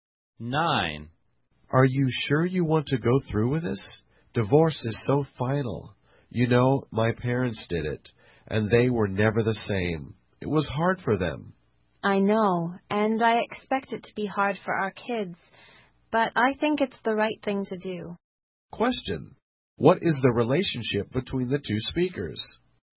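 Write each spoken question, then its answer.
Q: What is the relationship between the two speakers?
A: Husband and wife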